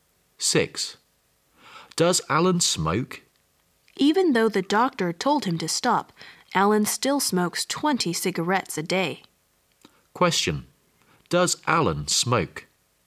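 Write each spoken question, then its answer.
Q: Does Alan smoke?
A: Yes, 20 cigarettes a day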